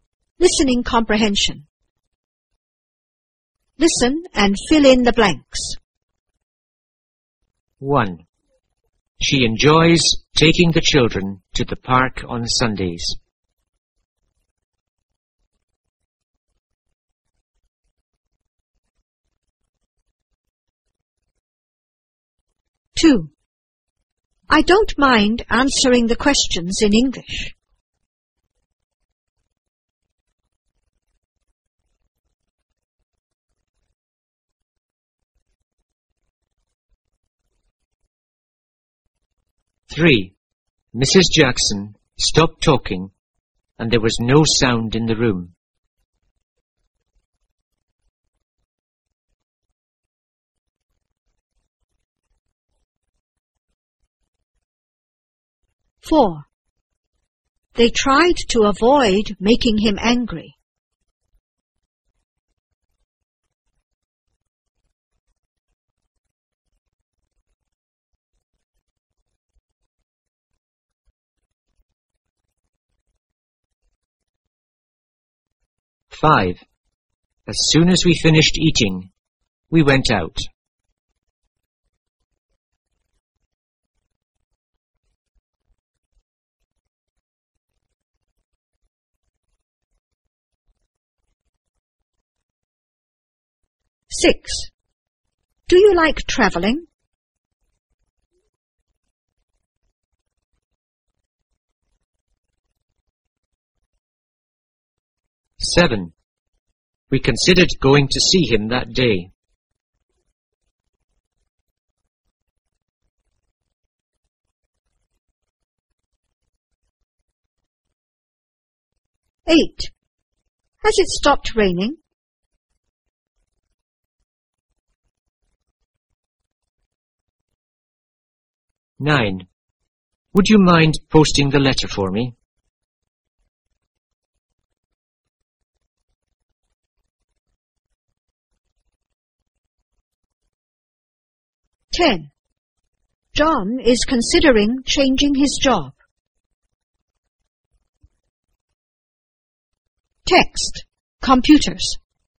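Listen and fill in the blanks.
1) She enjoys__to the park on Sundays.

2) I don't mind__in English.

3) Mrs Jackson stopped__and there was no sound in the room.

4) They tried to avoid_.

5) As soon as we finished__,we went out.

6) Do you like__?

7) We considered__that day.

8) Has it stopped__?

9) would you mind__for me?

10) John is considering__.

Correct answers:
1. taking the children
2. answering the questions
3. talking
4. making him angry
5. eating
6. traveling
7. going to see him
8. raining
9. posting the letter
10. changing his job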